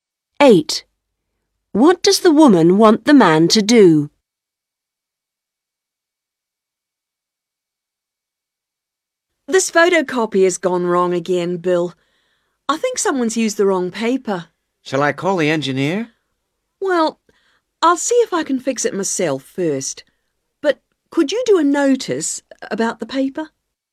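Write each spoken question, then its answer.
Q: What does the woman want the man to do?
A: Write a notice about the paper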